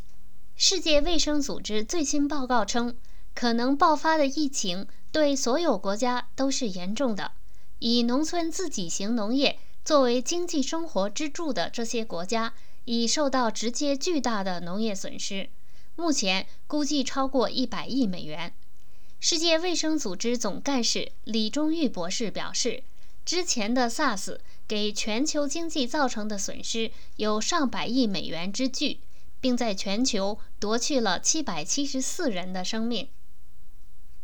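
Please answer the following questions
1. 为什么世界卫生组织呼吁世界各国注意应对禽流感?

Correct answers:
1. 可能爆发的疫情对所有国家都是严重的,会造成巨大的经济损失

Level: 3rd Year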